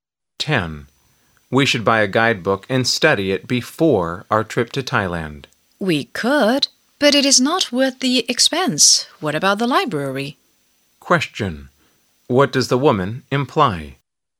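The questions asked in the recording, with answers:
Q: What does the woman imply?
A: They should borrow a guidebook from the library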